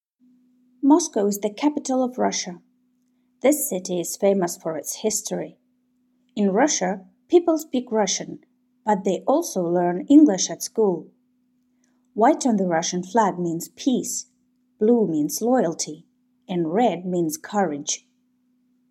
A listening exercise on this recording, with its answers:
Listen and choose only those facts that were mentioned in the text.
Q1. The capital of Russia is Moscow.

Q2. Students in Russia also learn English at school.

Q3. The blue colour on the flag means loyalty.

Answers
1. Верно
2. Верно
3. Верно

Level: 4 класс